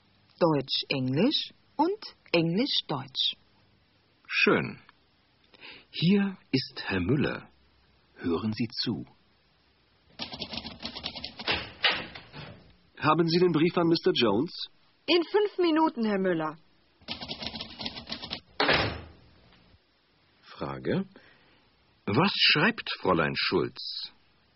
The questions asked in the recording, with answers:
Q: Frage: Was schreibt Fräulein Schulz?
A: Sie schreibt einen Brief an Mr.